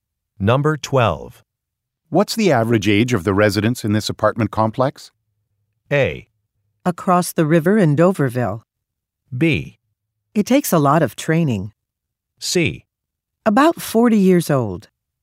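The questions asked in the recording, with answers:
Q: What's the average age of the residents in this apartment complex?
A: C: About 40 years old.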